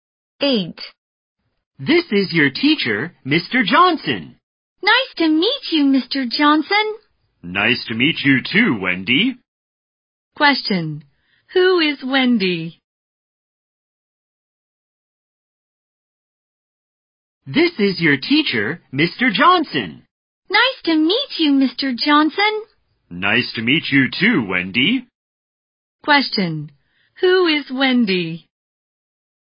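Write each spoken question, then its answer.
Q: Question. Who is Wendy?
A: Mr. Johnson's student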